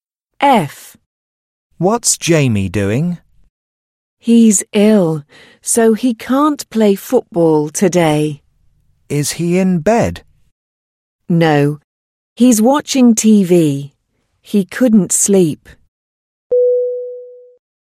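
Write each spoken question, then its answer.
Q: What's Jamie doing?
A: Watching TV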